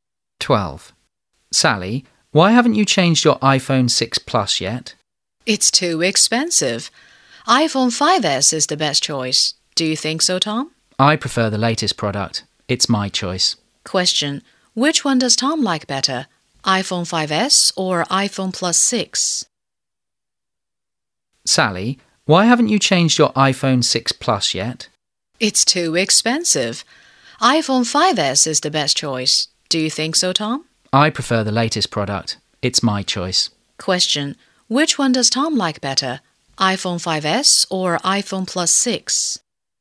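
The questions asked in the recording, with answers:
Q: Which one does Tom like better?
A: iPhone 6 Plus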